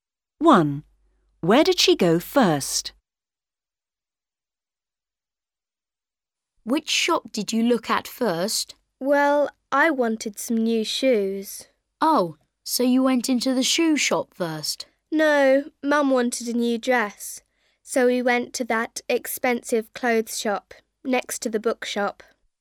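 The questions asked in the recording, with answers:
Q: Where did she go first?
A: the clothes shop (next to the bookshop)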